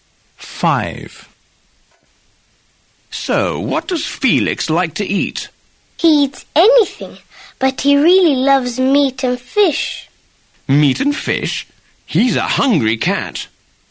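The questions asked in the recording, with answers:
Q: So, what does Felix like to eat?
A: meat and fish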